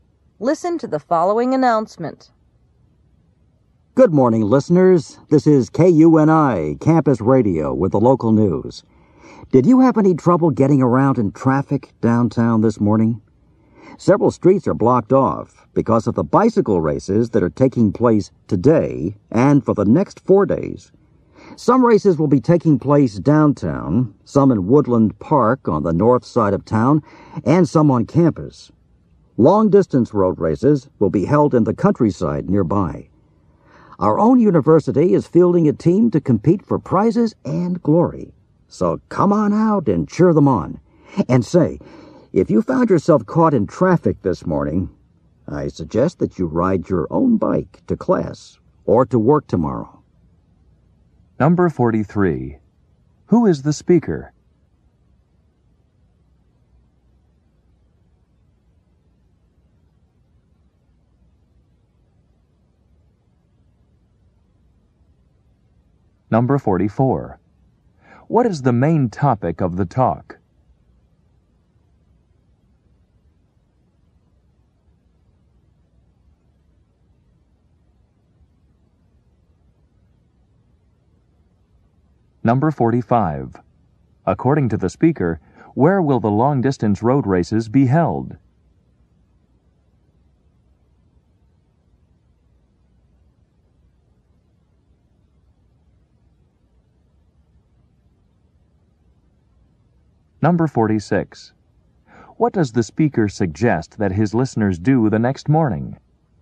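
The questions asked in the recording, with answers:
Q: Who is the speaker?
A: A campus radio announcer

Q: What is the main topic of the talk?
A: The bicycle races in town

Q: According to the speaker, where will the long-distance road races be held?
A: In the countryside nearby

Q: What does the speaker suggest that his listeners do the next morning?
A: Ride their own bikes to class or to work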